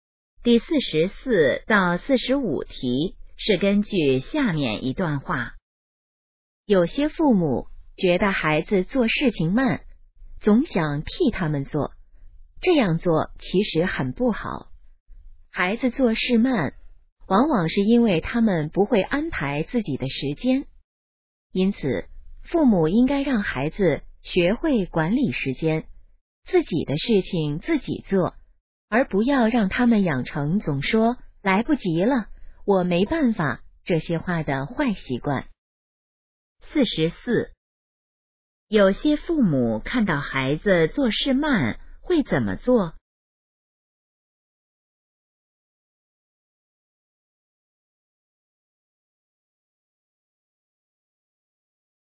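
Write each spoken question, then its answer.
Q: 有些父母看到孩子做事慢会怎么做?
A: 替他们做

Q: 根据这段话,应让孩子养成什么好习惯?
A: 管理时间,自己的事情自己做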